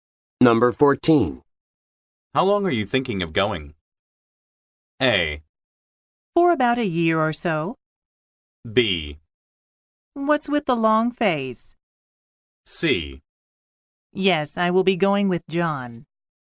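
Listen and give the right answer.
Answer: A: For about a year or so.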